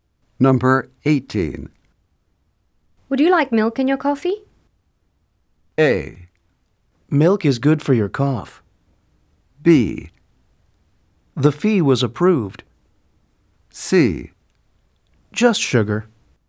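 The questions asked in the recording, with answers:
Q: Would you like milk in your coffee?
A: C: Just sugar.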